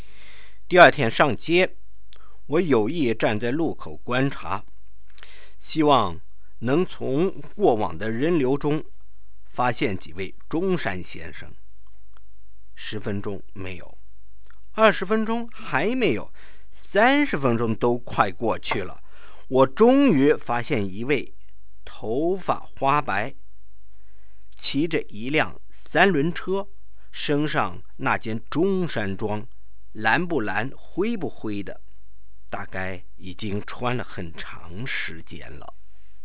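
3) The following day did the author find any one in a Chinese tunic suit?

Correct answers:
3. Yes. After nearly 30 minutes he saw one grey-haired man on a tricycle wearing a faded, long-worn tunic suit.

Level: 2nd Year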